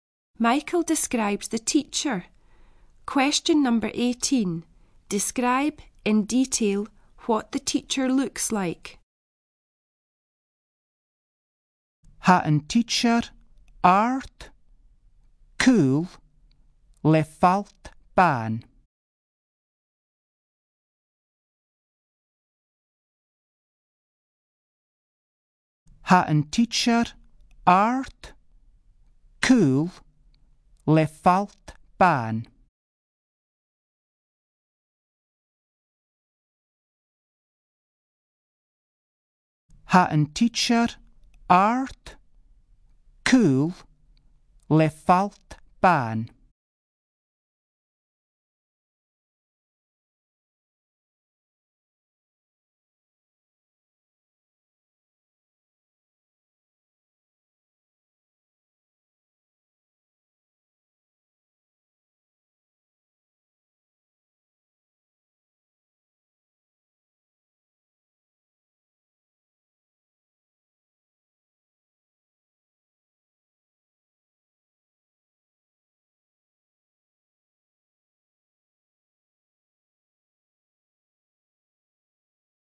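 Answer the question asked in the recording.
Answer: Tall and thin with fair hair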